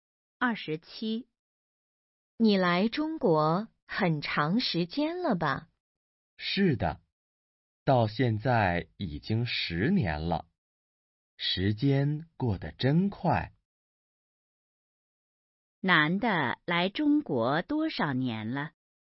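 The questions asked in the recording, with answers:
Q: 男的来中国多少年了?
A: 10年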